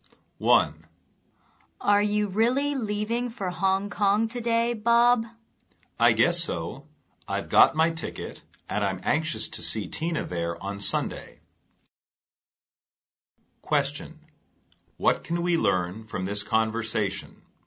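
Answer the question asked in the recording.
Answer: Bob is leaving for Hong Kong today to see Tina on Sunday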